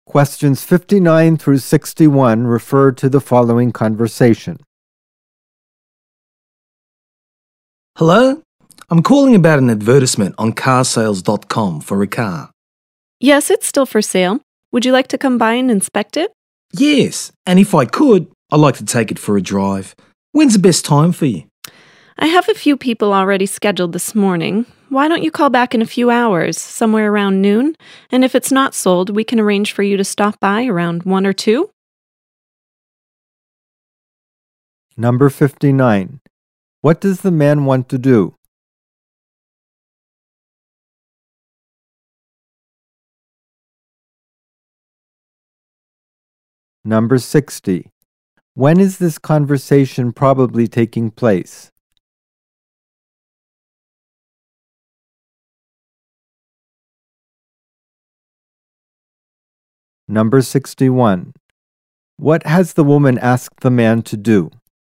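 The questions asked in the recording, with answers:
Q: What does the man want to do?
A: Inspect and test-drive a car for sale

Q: When is this conversation probably taking place?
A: In the morning

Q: What has the woman asked the man to do?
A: Call back around noon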